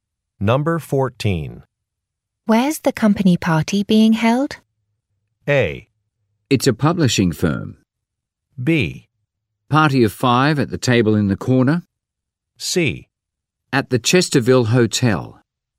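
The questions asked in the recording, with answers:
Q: Where's the company party being held?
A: C: At the Chesterville Hotel.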